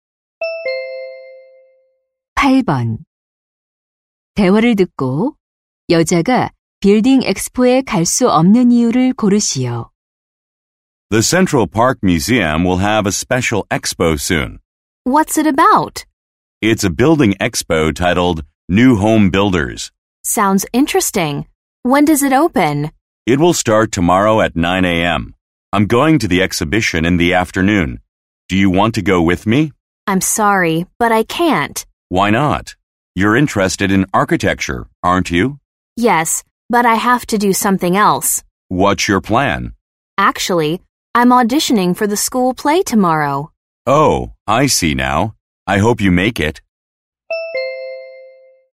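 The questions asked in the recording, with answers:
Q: 대화를 듣고 여자가 빌딩 엑스포에 갈 수 없는 이유를 고르시오.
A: 학교 연극 오디션이 있어서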